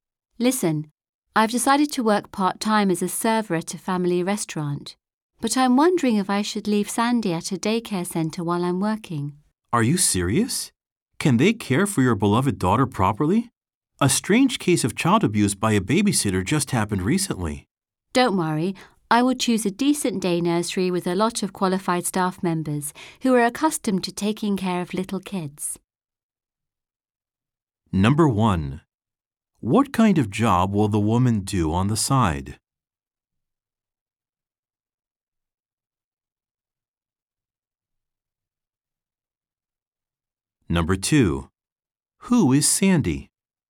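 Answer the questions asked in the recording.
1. A server at a family restaurant
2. The woman's daughter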